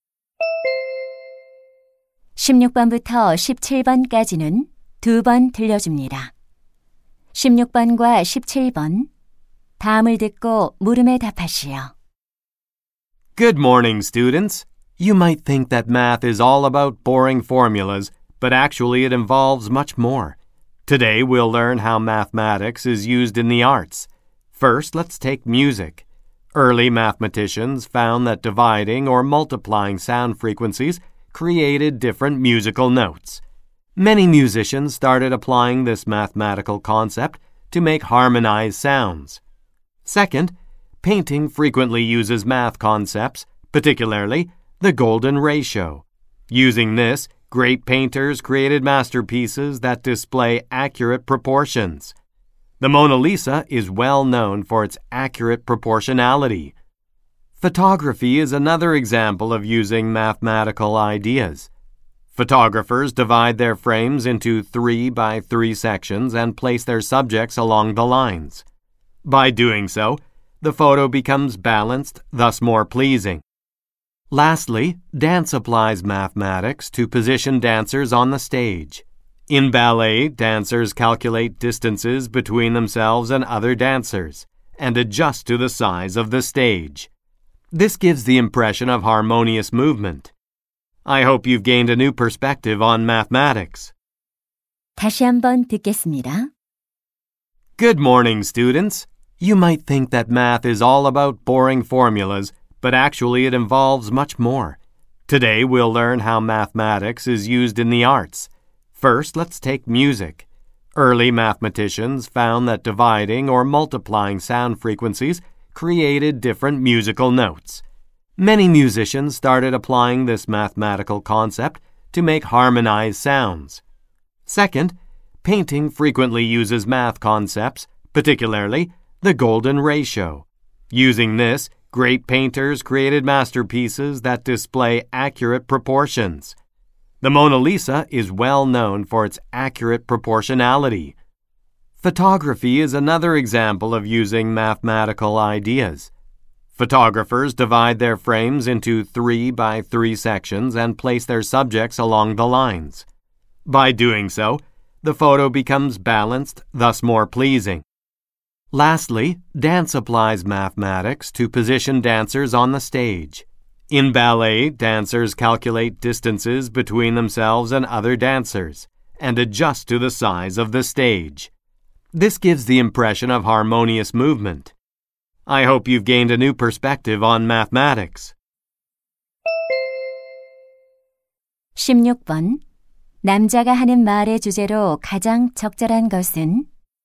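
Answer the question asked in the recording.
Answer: 예술에 수학이 활용되는 방식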